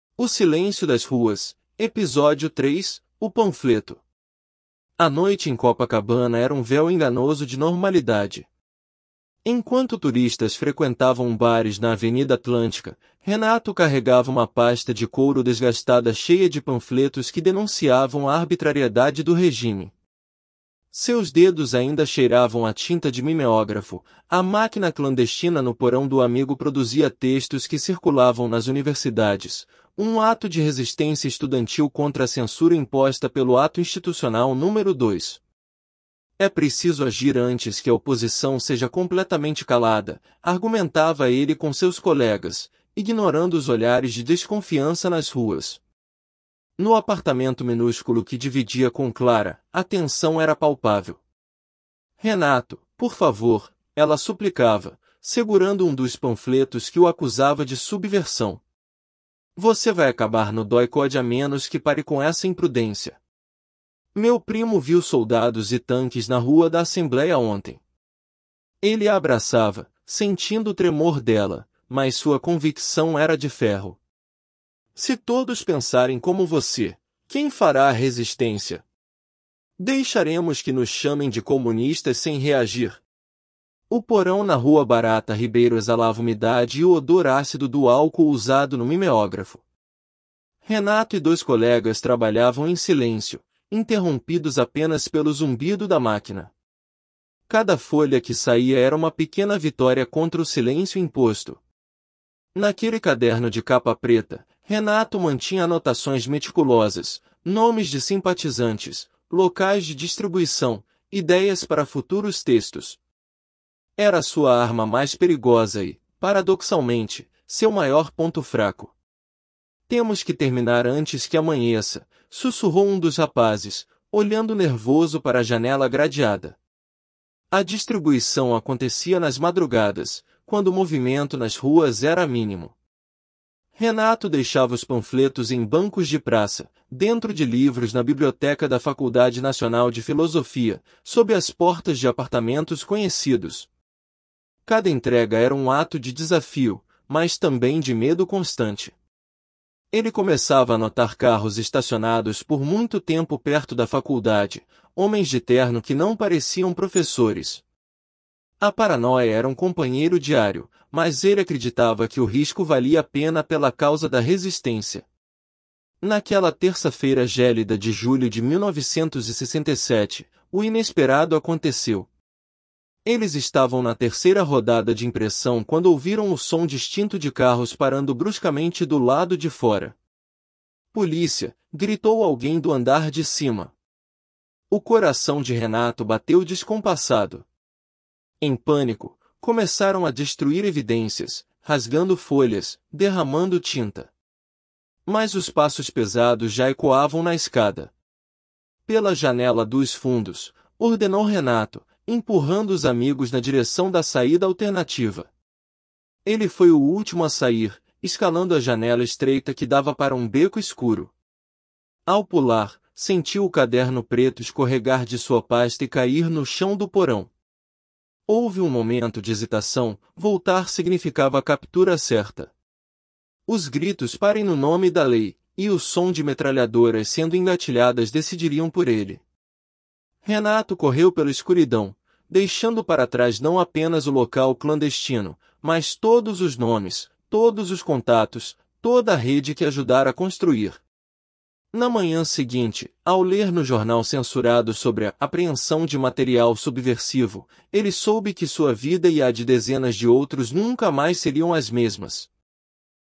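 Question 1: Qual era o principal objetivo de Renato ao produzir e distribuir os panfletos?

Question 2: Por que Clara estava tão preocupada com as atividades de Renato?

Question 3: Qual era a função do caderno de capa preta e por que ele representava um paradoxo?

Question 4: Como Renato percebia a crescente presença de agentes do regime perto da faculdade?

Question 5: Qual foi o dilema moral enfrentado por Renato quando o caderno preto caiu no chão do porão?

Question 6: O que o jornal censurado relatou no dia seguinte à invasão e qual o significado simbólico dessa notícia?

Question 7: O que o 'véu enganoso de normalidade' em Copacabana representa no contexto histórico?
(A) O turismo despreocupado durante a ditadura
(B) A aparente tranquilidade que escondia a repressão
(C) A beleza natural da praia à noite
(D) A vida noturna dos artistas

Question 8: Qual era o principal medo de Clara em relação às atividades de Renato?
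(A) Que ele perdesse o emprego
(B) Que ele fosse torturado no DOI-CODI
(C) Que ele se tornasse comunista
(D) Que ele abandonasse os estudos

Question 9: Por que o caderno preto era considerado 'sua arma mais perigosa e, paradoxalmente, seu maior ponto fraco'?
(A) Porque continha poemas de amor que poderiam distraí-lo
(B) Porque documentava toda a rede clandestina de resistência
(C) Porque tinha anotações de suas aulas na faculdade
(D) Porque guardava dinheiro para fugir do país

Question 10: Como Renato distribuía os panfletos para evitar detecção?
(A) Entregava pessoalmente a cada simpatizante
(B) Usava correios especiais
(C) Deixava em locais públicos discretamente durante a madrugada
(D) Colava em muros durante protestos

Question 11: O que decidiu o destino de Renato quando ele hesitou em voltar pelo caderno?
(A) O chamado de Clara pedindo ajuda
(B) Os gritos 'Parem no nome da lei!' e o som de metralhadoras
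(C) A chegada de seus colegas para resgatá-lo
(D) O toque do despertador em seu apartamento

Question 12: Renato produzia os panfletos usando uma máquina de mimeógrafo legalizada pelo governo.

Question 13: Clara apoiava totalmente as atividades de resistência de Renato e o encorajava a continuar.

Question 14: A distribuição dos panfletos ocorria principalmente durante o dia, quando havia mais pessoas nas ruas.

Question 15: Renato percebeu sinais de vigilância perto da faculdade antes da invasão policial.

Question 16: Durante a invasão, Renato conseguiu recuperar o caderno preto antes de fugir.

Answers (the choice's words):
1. Denunciar a arbitrariedade do regime e resistir à censura, agindo antes que a oposição fosse calada.
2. Temia que ele acabasse no DOI-CODI; o primo dela tinha visto soldados e tanques na rua.
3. Guardava nomes de simpatizantes, locais de distribuição e ideias para textos; era sua arma mais perigosa e também seu maior ponto fraco.
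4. Notava carros estacionados por muito tempo e homens de terno que não pareciam professores.
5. Voltar para buscar o caderno significava a captura certa; fugir significava deixar para trás os nomes de toda a rede.
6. A apreensão de material subversivo; significava que a vida dele e a de dezenas de outros nunca mais seriam as mesmas.
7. A aparente tranquilidade que escondia a repressão
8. Que ele fosse torturado no DOI-CODI
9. Porque documentava toda a rede clandestina de resistência
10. Deixava em locais públicos discretamente durante a madrugada
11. Os gritos 'Parem no nome da lei!' e o som de metralhadoras
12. Falso
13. Falso
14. Falso
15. Verdadeiro
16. Falso

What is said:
A noite em Copacabana era um véu enganoso de normalidade. Enquanto turistas frequentavam bares na Avenida Atlântica, Renato carregava uma pasta de couro desgastada cheia de panfletos que denunciavam a arbitrariedade do regime. 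Seus dedos ainda cheiravam a tinta de mimeógrafo – a máquina clandestina no porão do amigo produzia textos que circulavam nas universidades, um ato de resistência estudantil contra a censura imposta pelo Ato Institucional Número Dois. 'É preciso agir antes que a oposição seja completamente calada', argumentava ele com seus colegas, ignorando os olhares de desconfiança nas ruas.
No apartamento minúsculo que dividia com Clara, a tensão era palpável. 'Renato, por favor', ela suplicava, segurando um dos panfletos que o acusava de subversão. 'Você vai acabar no DOI-CODI a menos que pare com essa imprudência. Meu primo viu soldados e tanques na Rua da Assembléia ontem.' Ele a abraçava, sentindo o tremor dela, mas sua convicção era de ferro. 'Se todos pensarem como você, quem fará a resistência? Deixaremos que nos chamem de comunistas sem reagir?'
O porão na Rua Barata Ribeiro exalava umidade e o odor ácido do álcool usado no mimeógrafo. 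Renato e dois colegas trabalhavam em silêncio, interrompidos apenas pelo zumbido da máquina. Cada folha que saía era uma pequena vitória contra o silêncio imposto. Naquele caderno de capa preta, Renato mantinha anotações meticulosas – nomes de simpatizantes, locais de distribuição, ideias para futuros textos. Era sua arma mais perigosa e, paradoxalmente, seu maior ponto fraco. 'Temos que terminar antes que amanheça', sussurrou um dos rapazes, olhando nervoso para a janela gradeada.
A distribuição acontecia nas madrugadas, quando o movimento nas ruas era mínimo. Renato deixava os panfletos em bancos de praça, dentro de livros na biblioteca da Faculdade Nacional de Filosofia, sob as portas de apartamentos conhecidos. Cada entrega era um ato de desafio, mas também de medo constante. Ele começava a notar carros estacionados por muito tempo perto da faculdade, homens de terno que não pareciam professores. 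A paranoia era um companheiro diário, mas ele acreditava que o risco valia a pena pela causa da resistência.
Naquela terça-feira gélida de julho de 1967, o inesperado aconteceu. Eles estavam na terceira rodada de impressão quando ouviram o som distinto de carros parando bruscamente do lado de fora. 'Polícia!', gritou alguém do andar de cima. O coração de Renato bateu descompassado. Em pânico, começaram a destruir evidências, rasgando folhas, derramando tinta. Mas os passos pesados já ecoavam na escada. 'Pela janela dos fundos!', ordenou Renato, empurrando os amigos na direção da saída alternativa.
Ele foi o último a sair, escalando a janela estreita que dava para um beco escuro. Ao pular, sentiu o caderno preto escorregar de sua pasta e cair no chão do porão. Houve um momento de hesitação – voltar significava captura certa. Os gritos 'Parem no nome da lei!' e o som de metralhadoras sendo engatilhadas decidiriam por ele. 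Renato correu pela escuridão, deixando para trás não apenas o local clandestino, mas todos os nomes, todos os contatos, toda a rede que ajudara a construir. Na manhã seguinte, ao ler no jornal censurado sobre a 'apreensão de material subversivo', ele soube que sua vida e a de dezenas de outros nunca mais seriam as mesmas.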